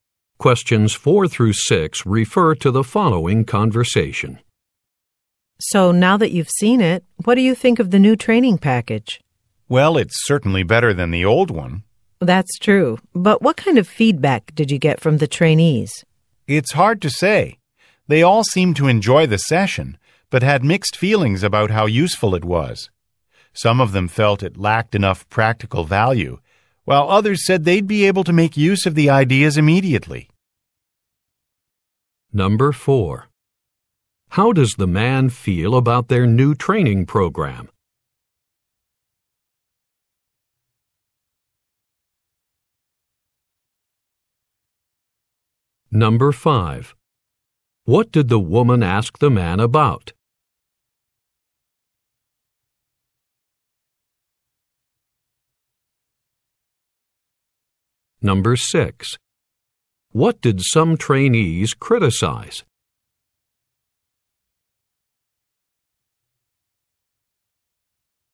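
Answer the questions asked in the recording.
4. It is better than the old one
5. Feedback from the trainees
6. It lacked practical value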